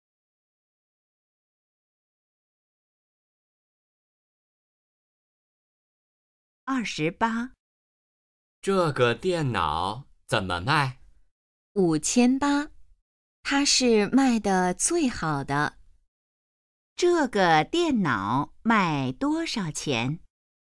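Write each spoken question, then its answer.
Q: 这个电脑卖多少钱?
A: 5800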